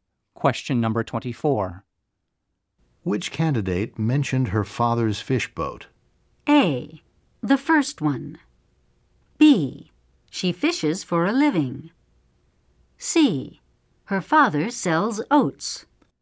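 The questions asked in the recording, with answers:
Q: Which candidate mentioned her father's fish boat?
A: A: The first one.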